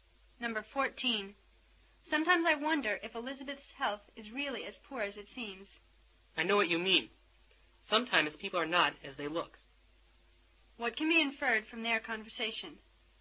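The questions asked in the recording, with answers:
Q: What can be inferred from their conversation?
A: Elizabeth may not be as sick as she seems.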